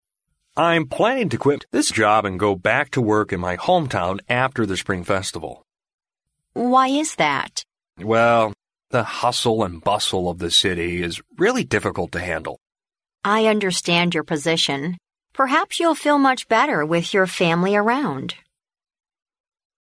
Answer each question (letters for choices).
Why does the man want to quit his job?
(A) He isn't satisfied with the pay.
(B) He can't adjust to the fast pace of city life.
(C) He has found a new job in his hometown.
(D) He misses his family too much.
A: B

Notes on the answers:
录音中男士说到的"hustle and bustle"意为"熙熙攘攘",可见是城市的快节奏让他想要辞职。因此B选项为正确答案。

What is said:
M: I'm planning to quit this job and go back to work in my hometown after the Spring Festival.
W: Why is that?
M: Well, the hustle and bustle of the city is really difficult to handle.
W: I understand your position. Perhaps you'll feel much better with your family around.